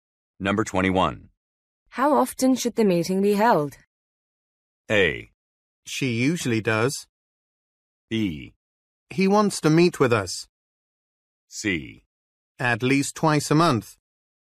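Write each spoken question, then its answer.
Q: How often should the meeting be held?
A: C: At least twice a month.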